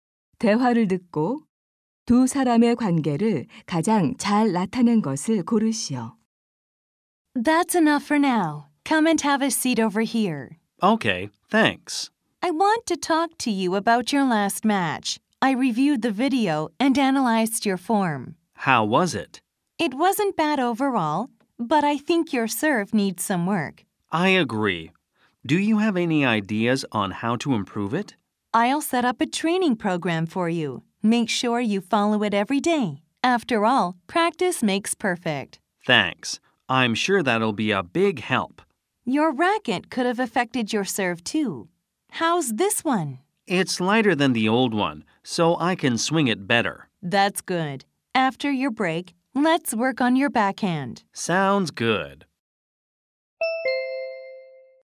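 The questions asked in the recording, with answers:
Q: 대화를 듣고 두 사람의 관계를 가장 잘 나타낸 것을 고르시오.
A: 테니스 코치와 선수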